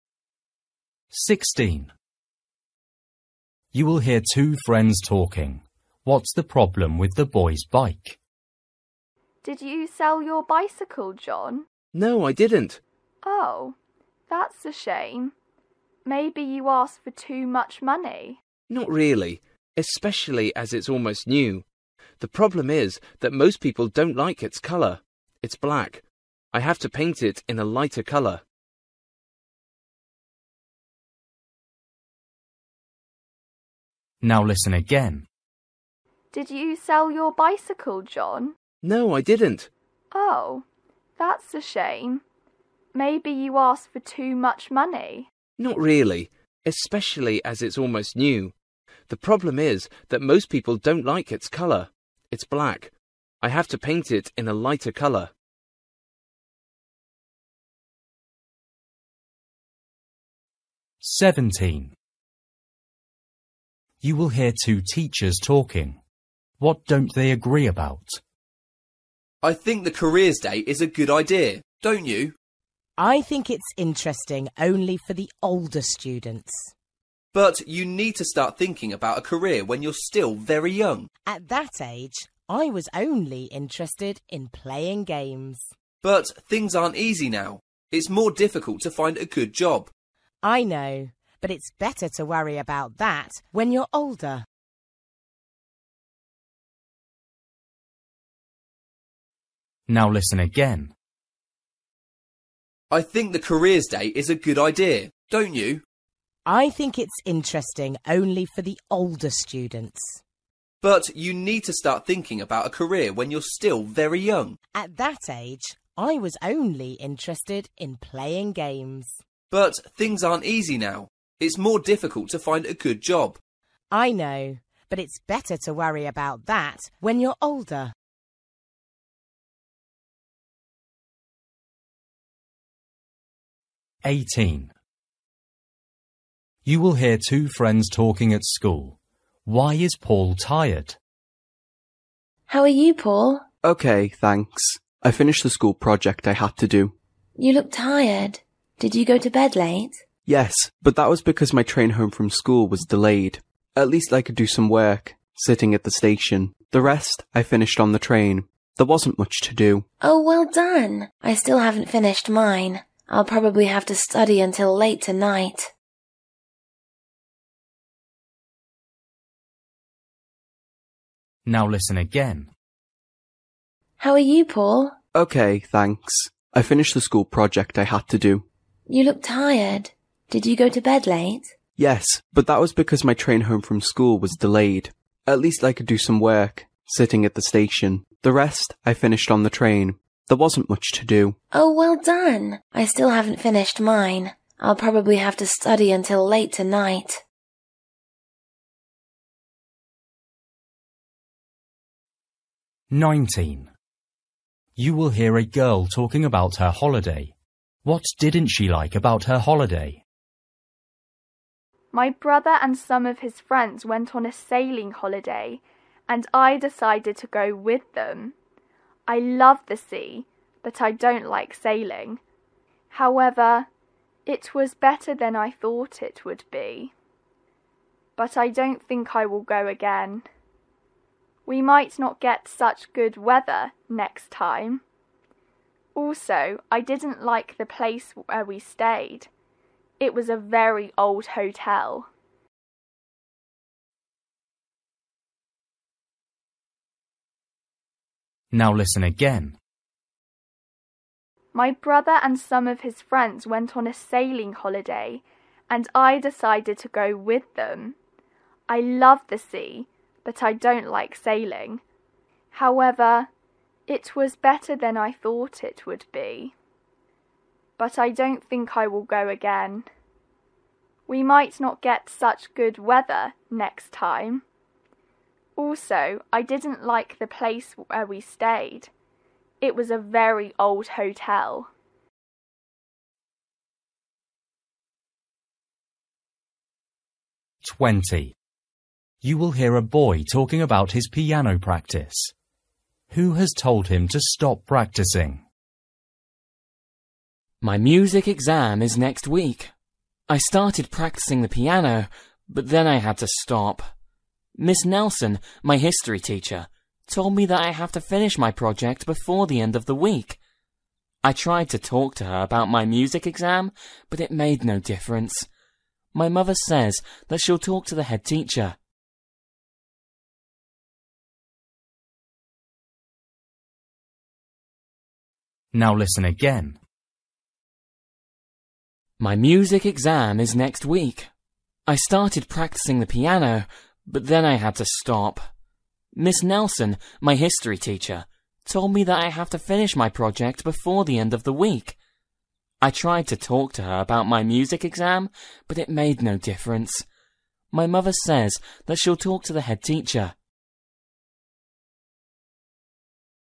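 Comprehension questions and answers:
For each question, choose the correct answer.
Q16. You will hear two friends talking. What's the problem with the boy's bike?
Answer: People don't like its colour (black).

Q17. You will hear two teachers talking. What don't they agree about?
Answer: Whether young students should think about careers (the careers day).

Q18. You will hear two friends talking at a school. Why is Paul tired?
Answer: His train home was delayed, so he went to bed late.

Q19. You will hear a girl talking about her holiday. What didn't she like about her holiday?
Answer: The old hotel where they stayed.

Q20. You will hear a boy talking about his piano practice. Who has told him to stop practising?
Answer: His history teacher, Miss Nelson.

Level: Luyện nghe trình độ A2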